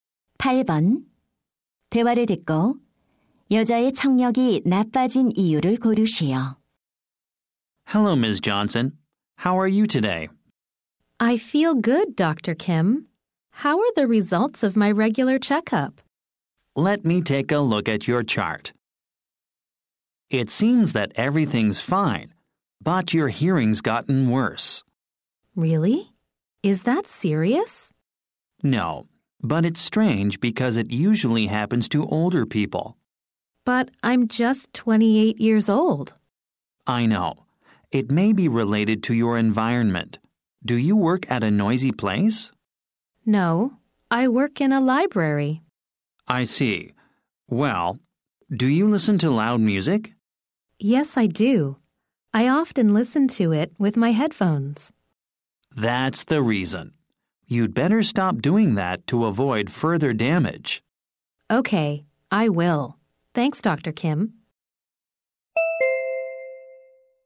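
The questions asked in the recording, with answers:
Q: 대화를 듣고 여자의 청력이 나빠진 이유를 고르시오.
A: 헤드폰으로 시끄러운 음악을 자주 들어서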